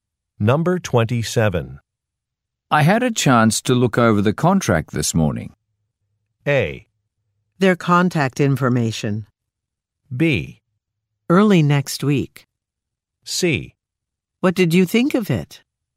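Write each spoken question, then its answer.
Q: I had a chance to look over the contract this morning.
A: C: What did you think of it?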